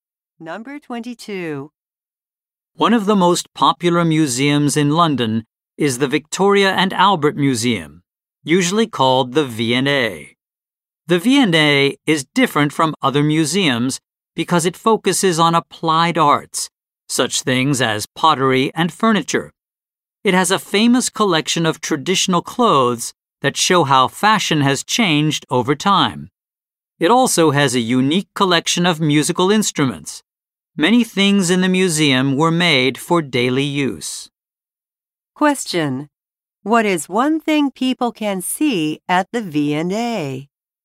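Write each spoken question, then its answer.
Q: What is one thing people can see at the V&A?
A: Traditional clothes / musical instruments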